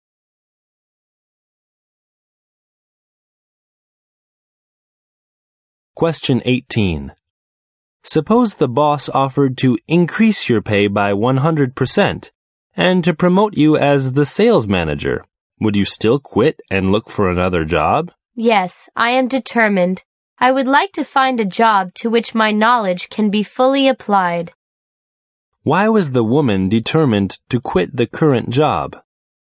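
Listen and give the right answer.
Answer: She wants a job where her knowledge can be fully applied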